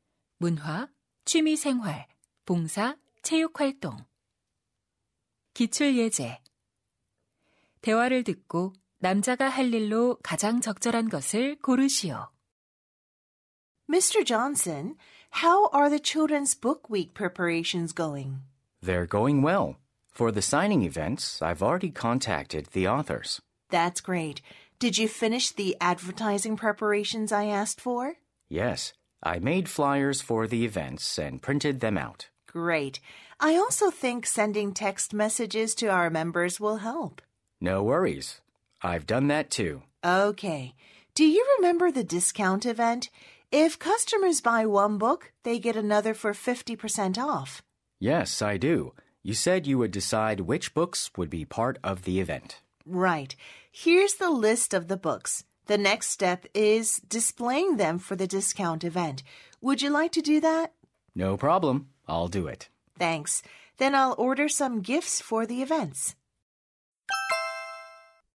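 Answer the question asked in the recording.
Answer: 할인 행사 책 진열하기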